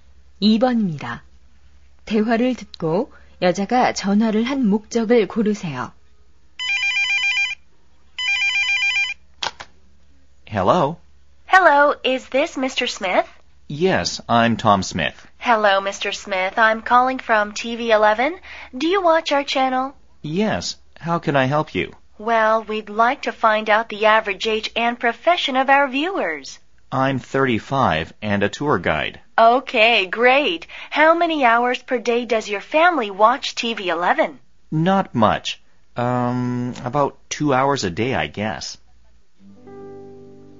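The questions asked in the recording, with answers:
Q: 대화를 듣고 여자가 전화를 한 목적을 고르세요.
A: 시청자 설문 조사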